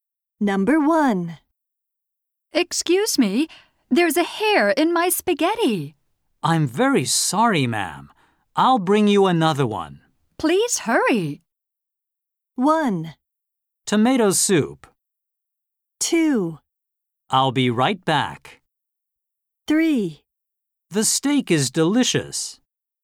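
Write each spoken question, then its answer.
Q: Please hurry.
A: 2: I'll be right back.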